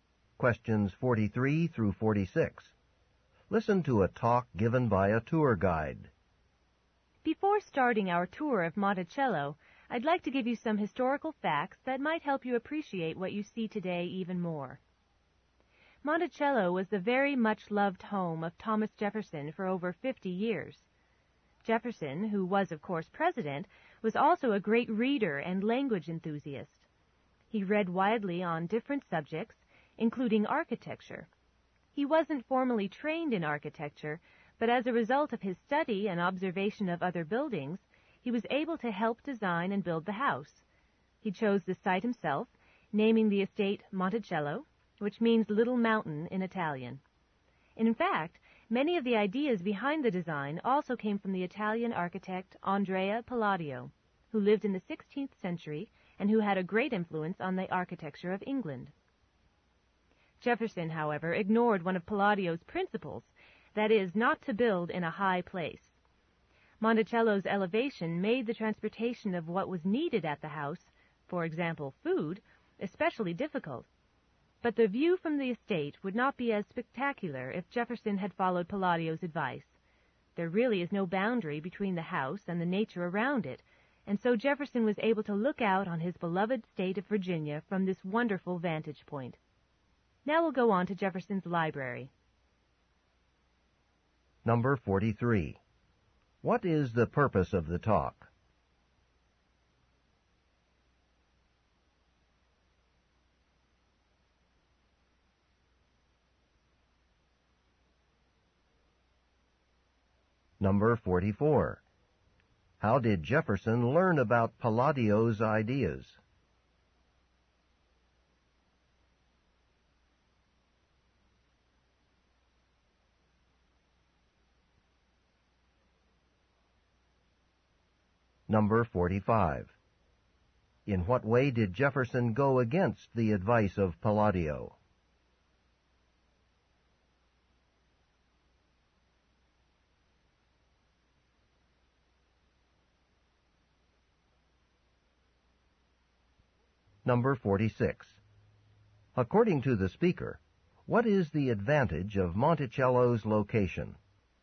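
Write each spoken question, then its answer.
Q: What is the purpose of the talk?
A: To give historical background on Monticello before the tour.

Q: In what way did Jefferson go against the advice of Palladio?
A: He built the house in a high place.

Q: According to the speaker, what is the advantage of Monticello's location?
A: The spectacular view.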